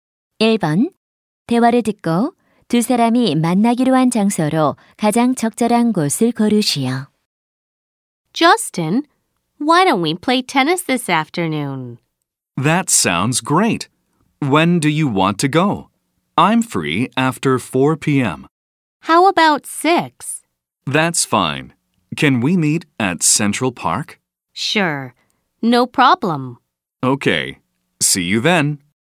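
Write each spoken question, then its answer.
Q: 대화를 듣고 두 사람이 만나기로 한 장소로 가장 적절한 곳을 고르시오.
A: 센트럴 파크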